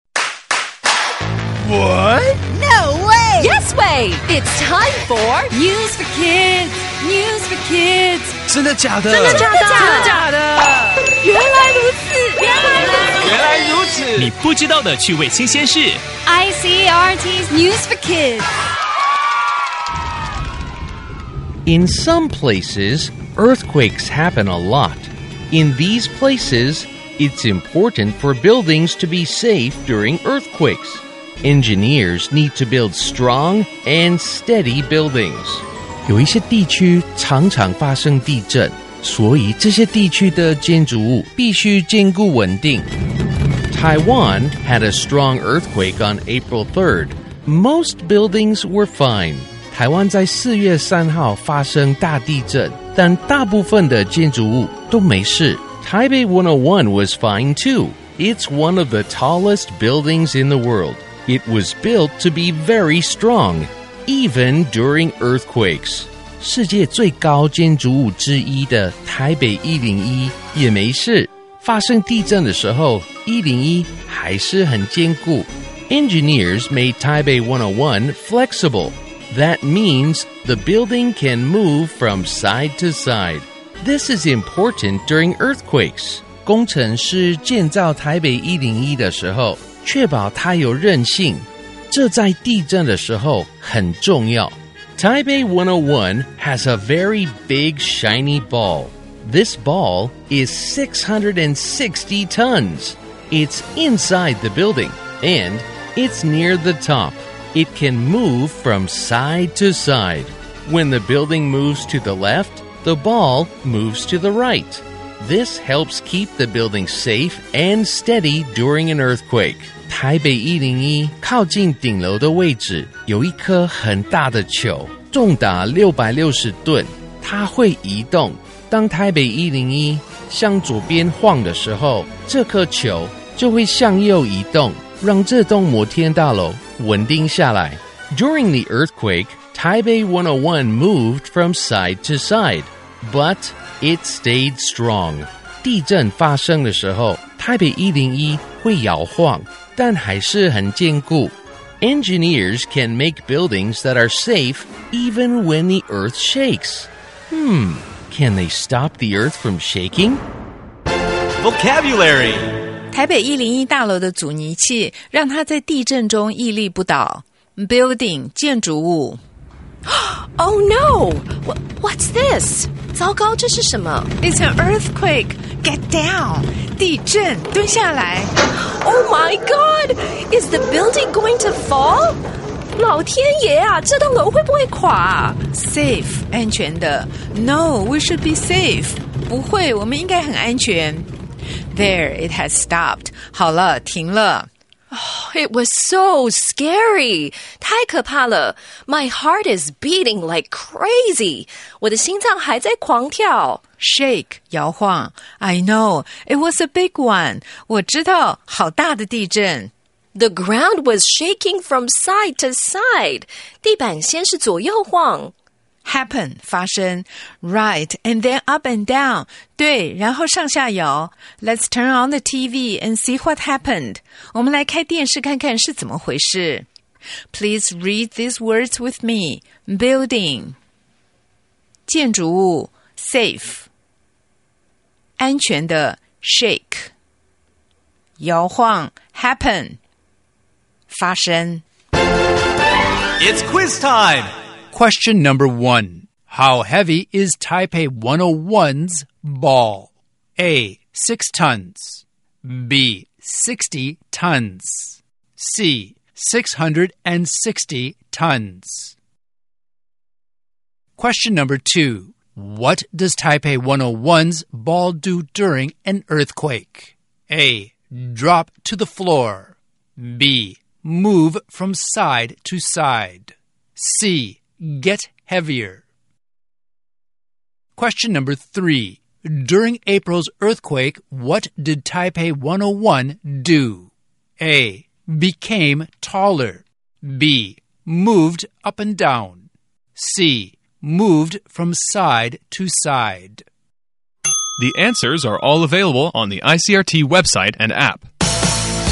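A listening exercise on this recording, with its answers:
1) How heavy is Taipei 101's ball?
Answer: 660 tons

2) What does Taipei 101's ball do during an earthquake?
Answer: Move from side to side

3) During April's earthquake, what did Taipei 101 do?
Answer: Moved from side to side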